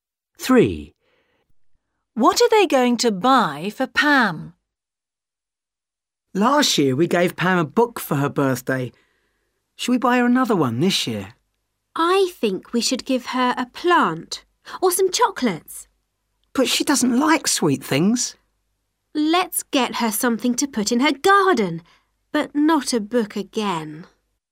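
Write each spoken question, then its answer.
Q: What are they going to buy for Pam?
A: A plant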